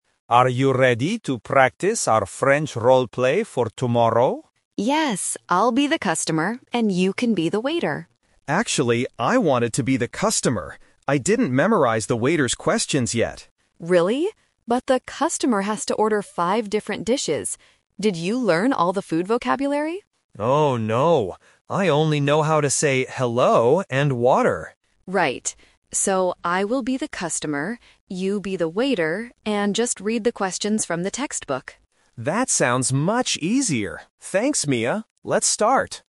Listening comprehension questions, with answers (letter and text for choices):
Listen to the conversation and circle the correct answer (A, B, or C).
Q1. What are David and Mia doing?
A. Having dinner at a French restaurant.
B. Practicing for a language class.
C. Buying a new textbook.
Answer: B. Practicing for a language class.

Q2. Who will play the role of the customer?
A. David.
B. Mia.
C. Their French teacher.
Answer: B. Mia.

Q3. Why doesn't David want to be the customer in the end?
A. He doesn't know the words for food.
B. He wants to read from the textbook.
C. He lost his menu.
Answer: A. He doesn't know the words for food.

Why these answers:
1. David says, "Are you ready to practice our French role-play for tomorrow?" They are students doing an assignment.
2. Near the end of the conversation, Mia confirms the final plan: "So, I will be the customer."
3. Mia reminds David that the customer has to order five dishes, and David admits he didn't learn the food vocabulary ("I only know how to say 'hello' and 'water'").

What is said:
David: Are you ready to practice our French role-play for tomorrow?
Mia: Yes! I'll be the customer, and you can be the waiter.
David: Actually, I wanted to be the customer. I didn't memorize the waiter's questions yet.
Mia: Really? But the customer has to order five different dishes. Did you learn all the food vocabulary?
David: Oh, no... I only know how to say "hello" and "water."
Mia: Right. So, I will be the customer. You be the waiter and just read the questions from the textbook.